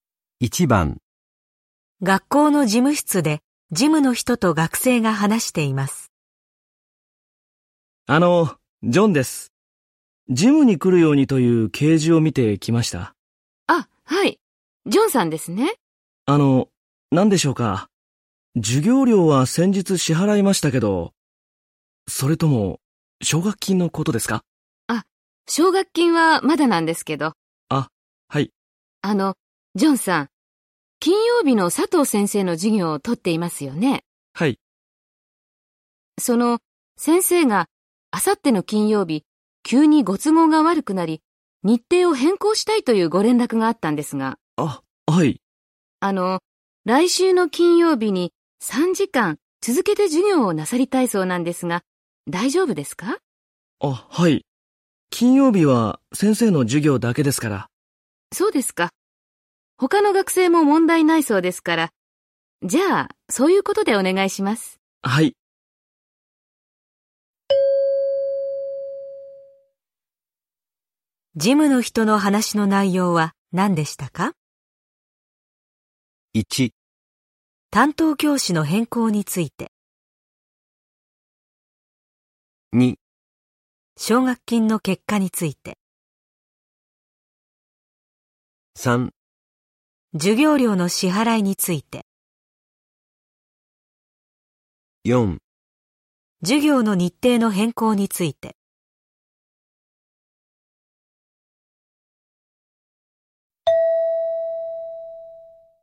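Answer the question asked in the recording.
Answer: 4: 授業の日程の変更について。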